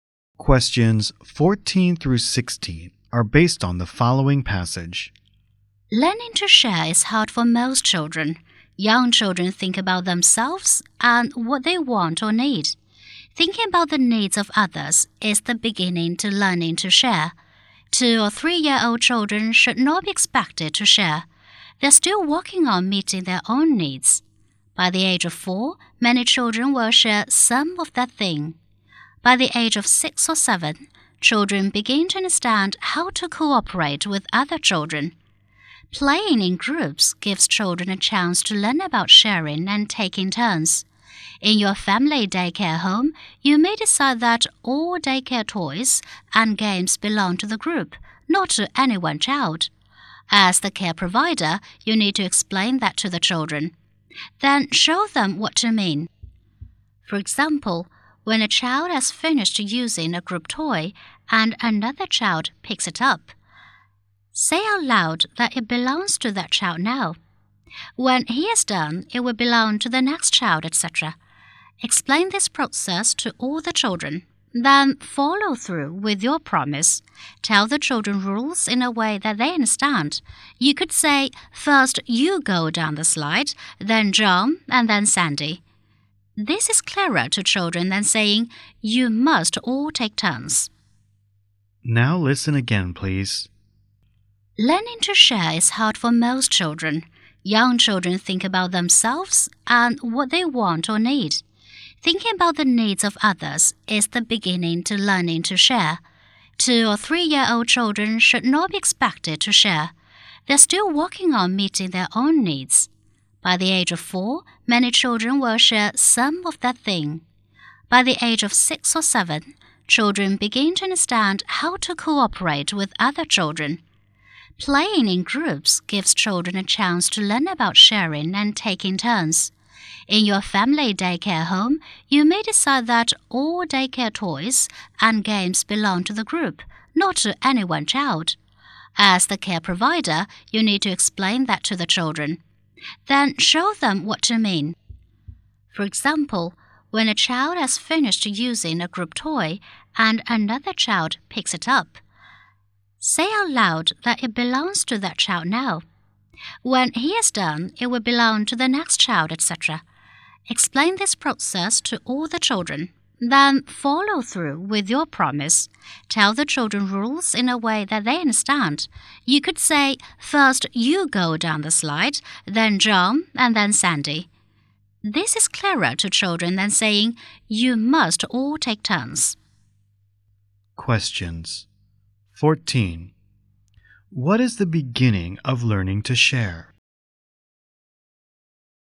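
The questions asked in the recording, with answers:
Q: What is the beginning of learning to share?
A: Thinking about the needs of others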